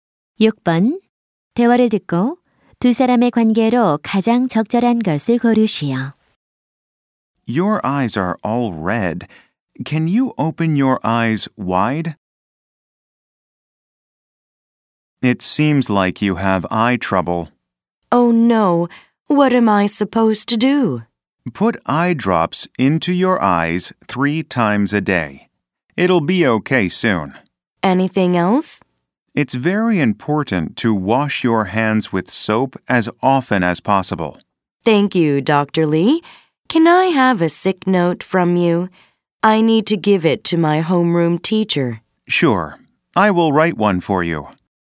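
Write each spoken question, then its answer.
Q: 대화를 듣고 두 사람의 관계로 가장 적절한 것을 고르시오.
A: 의사와 환자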